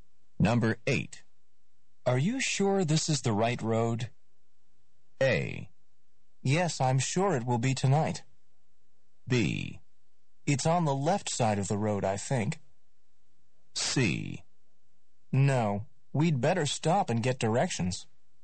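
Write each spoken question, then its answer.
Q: Are you sure this is the right road?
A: C: No, we'd better stop and get directions.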